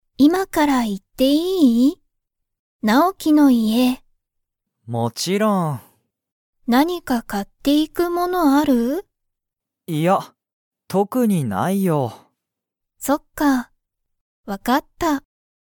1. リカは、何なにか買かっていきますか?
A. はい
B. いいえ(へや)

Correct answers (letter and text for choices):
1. B. いいえ(へや)

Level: Level 1